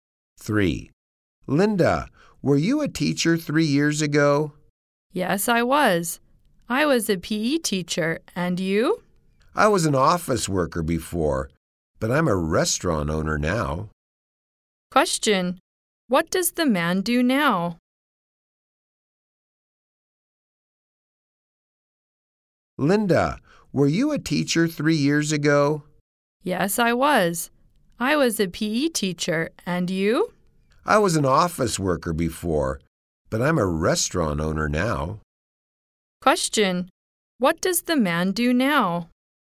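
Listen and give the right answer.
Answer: He is a restaurant owner.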